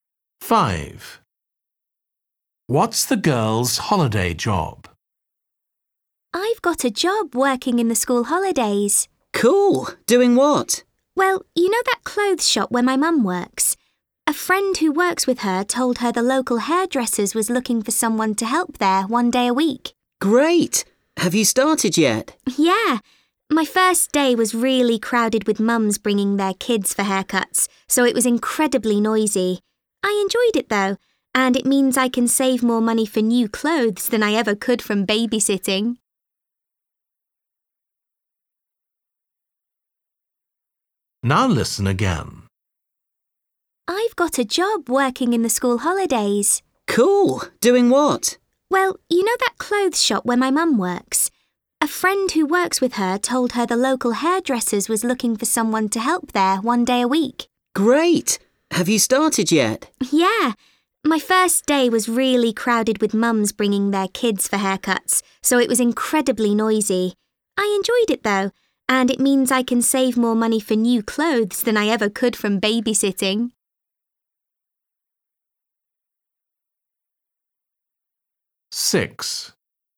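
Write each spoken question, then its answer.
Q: What's the girl's holiday job?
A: Helping at a hairdresser's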